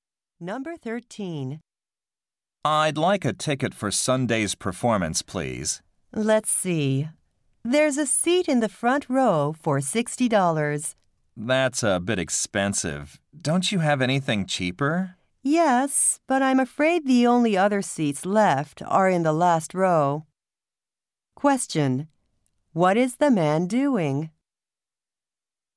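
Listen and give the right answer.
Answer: Buying a ticket for a performance.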